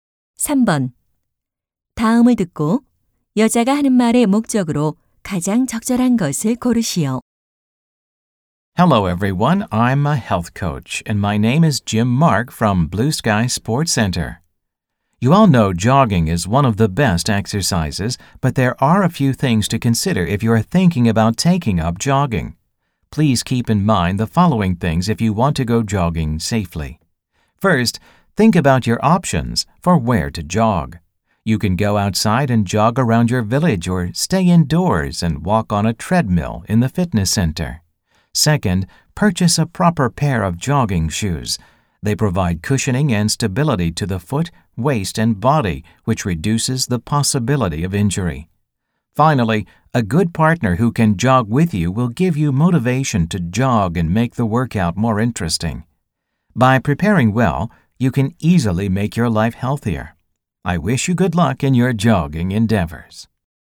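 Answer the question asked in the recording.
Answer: 안전한 조깅을 위한 유의 사항을 안내하려고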